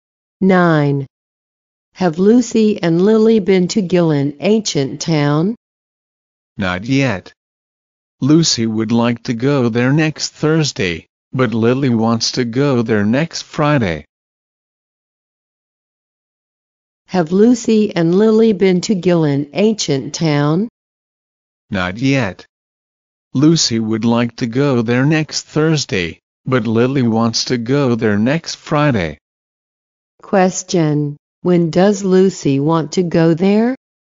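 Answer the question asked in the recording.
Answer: Next Thursday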